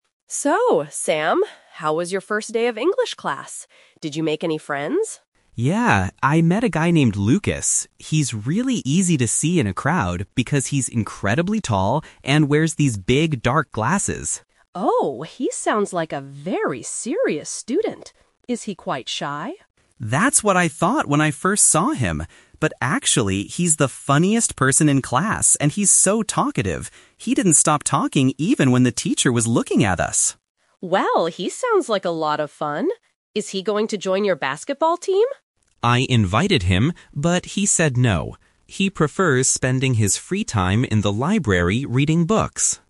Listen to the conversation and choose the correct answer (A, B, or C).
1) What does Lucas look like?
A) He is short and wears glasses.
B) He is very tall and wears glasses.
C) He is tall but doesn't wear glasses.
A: He is very tall and wears glasses.

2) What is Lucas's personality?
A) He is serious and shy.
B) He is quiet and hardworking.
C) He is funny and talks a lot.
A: He is funny and talks a lot.

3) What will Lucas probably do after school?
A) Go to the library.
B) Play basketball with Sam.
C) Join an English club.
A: Go to the library.

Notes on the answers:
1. Sam says Lucas is "incredibly tall and wears these big, dark glasses." The Trap: Option (C) mentions he is tall but tries to trick those who missed the second half of the sentence about his glasses.
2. Sam uses the "Twist" technique: He says he thought Lucas was serious at first, but "actually, he's the funniest person... and so talkative." The Trap: Option (A) is what Sam thought at first, and what the Mom guessed, but it is not Lucas's real personality.
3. Sam says Lucas said "no" to basketball and "prefers spending his free time in the library." The Trap: Option (B) is a trap because the basketball team is mentioned as an invitation, but Lucas rejected it.

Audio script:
Mom: So, Sam, how was your first day of English class? Did you make any friends?
Sam: Yeah, I met a guy named Lucas. He's really easy to see in a crowd because he's incredibly tall and wears these big, dark glasses.
Mom: Oh! He sounds like a very serious student. Is he quite shy?
Sam: That's what I thought when I first saw him! But actually, he's the funniest person in class and he's so talkative. He didn't stop talking even when the teacher was looking at us!
Mom: Well, he sounds like a lot of fun. Is he going to join your basketball team?
Sam: I invited him, but he said no. He prefers spending his free time in the library reading books.

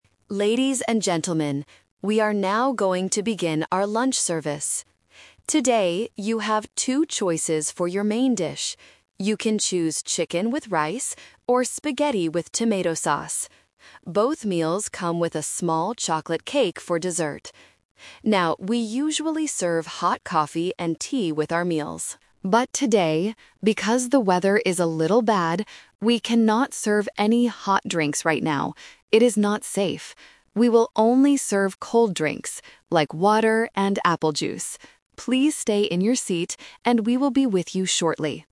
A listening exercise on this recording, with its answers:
Listen to the flight attendant's announcement, and choose the correct answer (A, B, or C) for each question.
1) What are the two main dish choices for lunch?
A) Chicken with rice or spaghetti with tomato sauce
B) Beef with rice or a chicken sandwich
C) Spaghetti with meat sauce or a fresh salad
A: Chicken with rice or spaghetti with tomato sauce

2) What dessert comes with the meal?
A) Fresh fruit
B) Ice cream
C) A chocolate cake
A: A chocolate cake

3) Why are they NOT serving hot drinks today?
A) Because they only serve hot drinks after the meal.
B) Because the weather is bad.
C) Because the coffee machine is broken.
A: Because the weather is bad.

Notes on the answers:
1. The flight attendant clearly lists the two choices: "chicken with rice, or spaghetti with tomato sauce." Option (B) is a trap that uses the words "chicken" and "rice" but in the wrong meals. Option (C) is a plausible airplane meal but is not mentioned.
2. The speaker says, "Both meals come with a small chocolate cake for dessert." Options (A) and (B) are common desserts on airplanes but are never mentioned in the audio.
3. The flight attendant explains the change in routine by saying, "But today, because the weather is a little bad, we cannot serve any hot drinks right now." Option (A) is a common airplane rule, but it is not the reason given here. Option (C) is a plausible problem, but it is not mentioned.

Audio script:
Flight Attendant: Ladies and gentlemen, we are now going to begin our lunch service. Today, you have two choices for your main dish: you can choose chicken with rice, or spaghetti with tomato sauce. Both meals come with a small chocolate cake for dessert. Now, we usually serve hot coffee and tea with our meals. But today, because the weather is a little bad, we cannot serve any hot drinks right now. It is not safe. We will only serve cold drinks, like water and apple juice. Please stay in your seat, and we will be with you shortly.

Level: A2

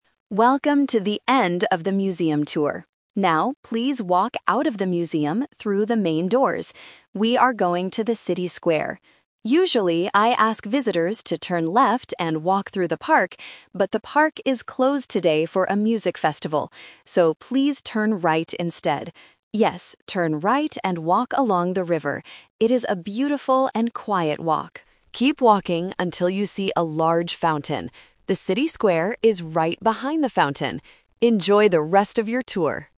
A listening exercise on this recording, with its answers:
Listen to the audio guide for a walking tour. Choose the correct answer (A, B, or C) for each question.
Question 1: Why can't visitors walk through the park today?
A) Because it is being cleaned.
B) Because it is closed for a music festival.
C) Because there are too many people.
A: Because it is closed for a music festival.

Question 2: Which way should the visitors turn when they leave the museum?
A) Turn left.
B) Go straight.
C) Turn right.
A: Turn right.

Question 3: Where should the visitors walk to reach the City Square?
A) Along the river.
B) Through the park.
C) Inside the museum.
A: Along the river.

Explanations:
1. The Key: The audio guide explicitly states the reason: "...but the park is closed today for a music festival." The Trap: Options (A) and (C) are plausible real-life reasons for a park to be closed or avoided, but they are completely unmentioned in the audio.
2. The Key: The guide gives the updated direction clearly: "So, please turn right instead." The Trap: Option (A) is the classic "Twist" trap. The guide was going to tell them to turn left, but changed the instruction because of the festival.
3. The Key: The guide says, "Yes, turn right and walk along the river." The Trap: Option (B) is the old, canceled route. Option (C) is where the visitors just came from, not where they are going.

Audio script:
Audio Guide Voice: Welcome to the end of the museum tour. Now, please walk out of the museum through the main doors. We are going to the City Square. Usually, I ask visitors to turn left and walk through the park, but the park is closed today for a music festival. So, please turn right instead. Yes, turn right and walk along the river. It is a beautiful and quiet walk. Keep walking until you see a large fountain.

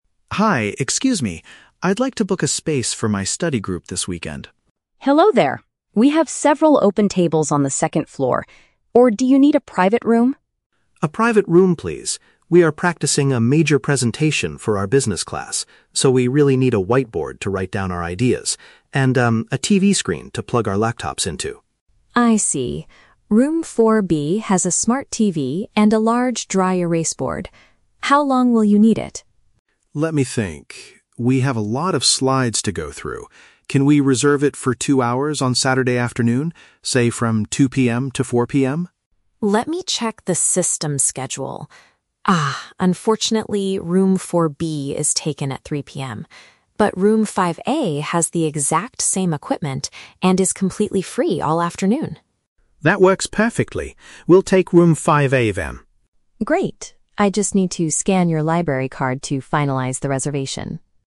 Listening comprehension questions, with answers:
Listen to the conversation between a student and a library manager, and choose the correct answer (A, B, or C) for each question.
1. Why does Leo need to book a private room?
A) To rehearse a group speech for a class.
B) To study quietly for an upcoming business exam.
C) To watch an educational movie with his friends.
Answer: To rehearse a group speech for a class.

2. What specific equipment does Leo request for the room?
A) A digital projector and a microphone.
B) A smart TV and a library laptop.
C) A display monitor and a surface for writing.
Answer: A display monitor and a surface for writing.

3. Why does the librarian give Leo Room 5A instead of Room 4B?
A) Because Room 4B is currently closed for repairs.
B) Because Room 4B is partially booked during his requested time.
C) Because Room 5A has better equipment for business students.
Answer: Because Room 4B is partially booked during his requested time.

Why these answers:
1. Leo states, "We are practicing a major presentation." Option A paraphrases this perfectly as "rehearse a group speech." Option B is a trap; he mentions a "business class," but they are preparing a presentation, not studying for an exam. Option C is plausible for using a TV, but it is not mentioned in the audio.
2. Leo specifically asks for "a whiteboard" and "a TV screen." Option C perfectly paraphrases this as a "surface for writing" and a "display monitor." Option A is not mentioned. Option B is a trap; a smart TV is mentioned, but Leo says they will plug their own laptops in, so he is not requesting a library laptop.
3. Leo wants the room from 2:00 PM to 4:00 PM (two hours), but the librarian says Room 4B is "taken at 3:00 PM." Option B paraphrases this as being "partially booked during his requested time." Option A is not mentioned. Option C is a trap; the librarian says Room 5A has the "exact same equipment," not better equipment.

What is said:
Leo: Hi, excuse me. I'd like to book a space for my study group this weekend.
Parker: Hello there. We have several open tables on the second floor, or do you need a private room?
Leo: A private room, please. We are practicing a major presentation for our business class, so we really need a whiteboard to write down our ideas, and... a TV screen to plug our laptops into.
Parker: I see. Room 4B has a smart TV and a large dry-erase board. How long will you need it?
Leo: Let me think... we have a lot of slides to go through. Can we reserve it for two hours on Saturday afternoon?
Parker: Let me check the system schedule. Ah, unfortunately, Room 4B is taken at 3:00 PM. But Room 5A has the exact same equipment and is completely free all afternoon.
Leo: That works perfectly. We'll take Room 5A then.

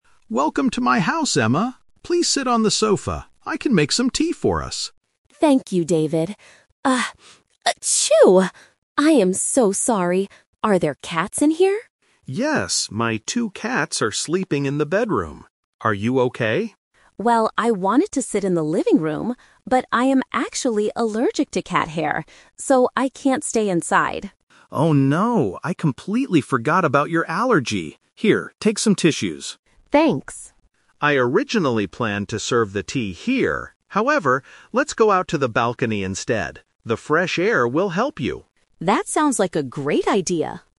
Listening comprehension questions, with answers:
Listen to the conversation between a host and his guest, and choose the correct answer (A, B, or C).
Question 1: What is Emma's problem?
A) She has a very bad cold.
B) She is afraid of cats.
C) She is allergic to cats.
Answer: She is allergic to cats.

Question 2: Where are David's cats right now?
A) In the bedroom.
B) On the sofa.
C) On the balcony.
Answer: In the bedroom.

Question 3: Where will they drink their tea?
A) In the living room.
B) On the balcony.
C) In the bedroom.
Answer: On the balcony.

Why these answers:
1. Emma clearly states, "I am actually allergic to cat hair." Option (A) is a plausible reason for sneezing in real life, but it is not mentioned. Option (B) is the trap; she cannot stay inside because of her allergy, not because she is scared.
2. David says, "my two cats are sleeping in the bedroom." Option (B) is the trap; the sofa is where David asked Emma to sit. Option (C) is where they go at the end of the conversation.
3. David changes the plan and says, "let's go out to the balcony instead." Option (A) is the trap; David originally planned to serve the tea in the living room, but they couldn't stay there because of Emma's allergy (The Twist). Option (C) is a distractor.

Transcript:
David: Welcome to my house, Emma! Please sit on the sofa. I can make some tea for us.
Emma: Thank you, David. Ah... achoo! I am so sorry. Are there cats in here?
David: Yes, my two cats are sleeping in the bedroom. Are you okay?
Emma: Well, I wanted to sit in the living room, but I am actually allergic to cat hair. So, I can't stay inside.
David: Oh no! I completely forgot about your allergy. Here, take some tissues.
Emma: Thanks.
David: I originally planned to serve the tea here, however, let's go out to the balcony instead. The fresh air will help you.

